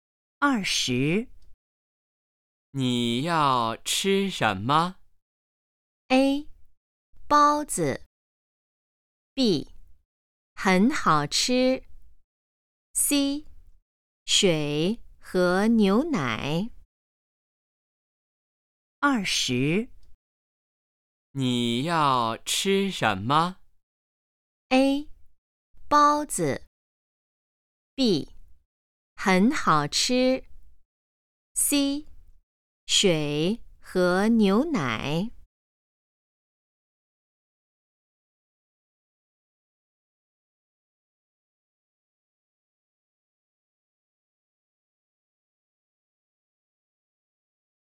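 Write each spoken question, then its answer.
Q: 你要吃什么?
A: A: 包子。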